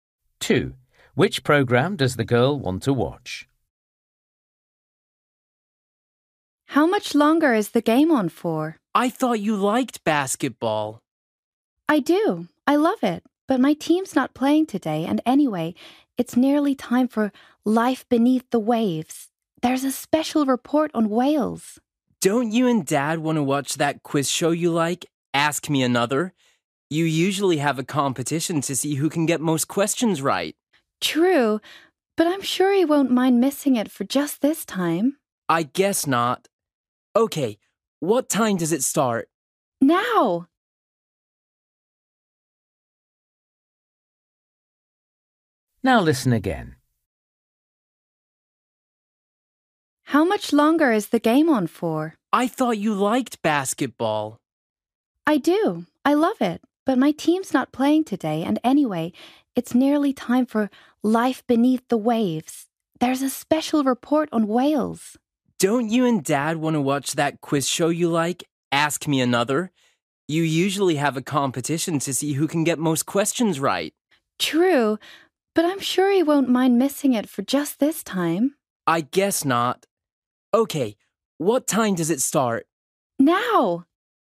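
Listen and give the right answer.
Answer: Life Beneath the Waves (a special report on whales)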